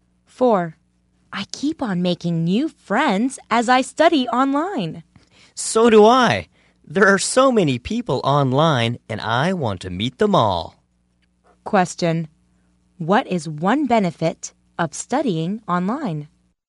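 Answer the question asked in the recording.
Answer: Making new friends.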